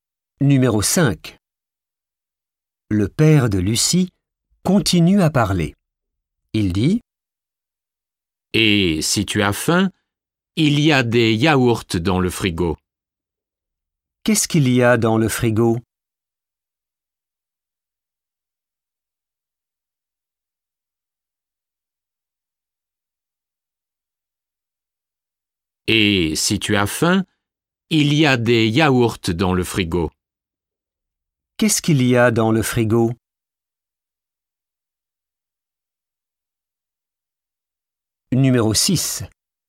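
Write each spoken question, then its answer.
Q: Qu'est-ce qu'il y a dans le frigo?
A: Des yaourts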